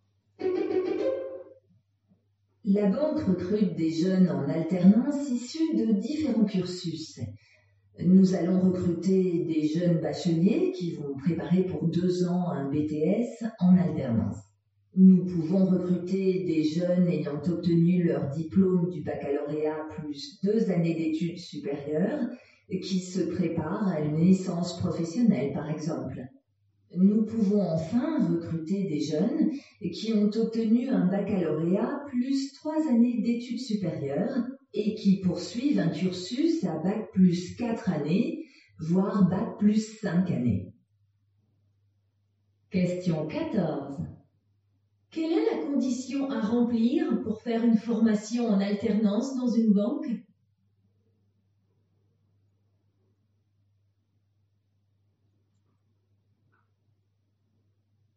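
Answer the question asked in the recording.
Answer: Avoir le baccalauréat.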